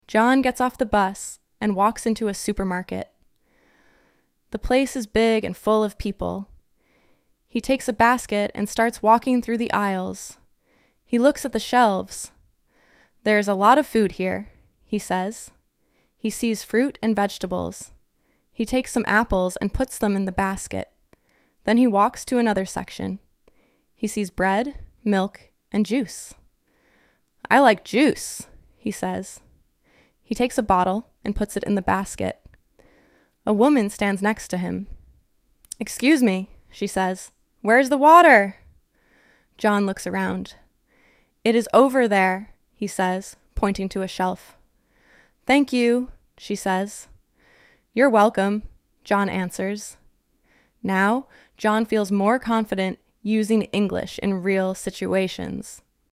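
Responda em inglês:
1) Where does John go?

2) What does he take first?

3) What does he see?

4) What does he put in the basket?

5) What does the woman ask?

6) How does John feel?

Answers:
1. To a supermarket
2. A basket
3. Fruit and vegetables, bread, milk and juice
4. Some apples and a bottle of juice
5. Where is the water?
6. More confident using English

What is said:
John gets off the bus and walks into a supermarket. The place is big and full of people.
He takes a basket and starts walking through the aisles.
He looks at the shelves.
"There is a lot of food here," he says.
He sees fruit and vegetables.
He takes some apples and puts them in the basket.
Then he walks to another section.
He sees bread, milk, and juice.
"I like juice," he says.
He takes a bottle and puts it in the basket.
A woman stands next to him.
"Excuse me," she says. "Where is the water?"
John looks around.
"It is over there," he says, pointing to a shelf.
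"Thank you," she says.
"You're welcome," John answers.
Now John feels more confident using English in real situations.

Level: Inglês Básico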